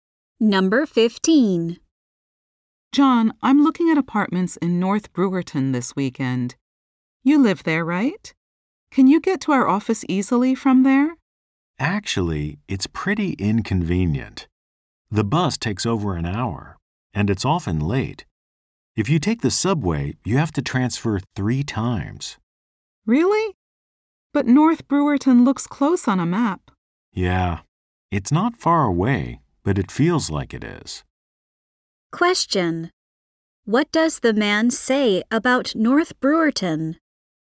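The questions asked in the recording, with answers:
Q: What does the man say about North Brewerton?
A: It is hard to get to the office from there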